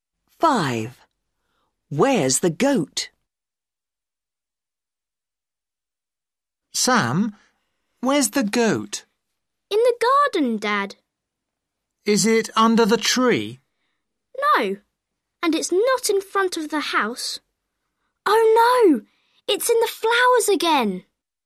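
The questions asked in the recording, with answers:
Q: Where's the goat?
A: In the flowers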